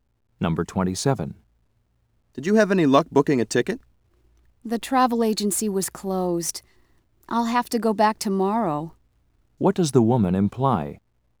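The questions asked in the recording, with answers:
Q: What does the woman imply?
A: She hasn't booked the ticket yet; she'll try again tomorrow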